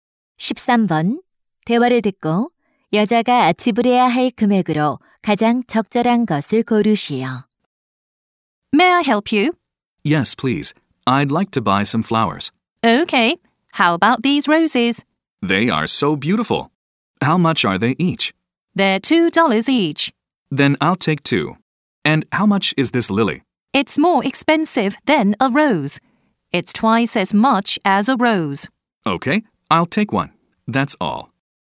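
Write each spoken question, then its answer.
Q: 대화를 듣고 여자가 지불해야 할 금액으로 가장 적절한 것을 고르시오.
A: 8달러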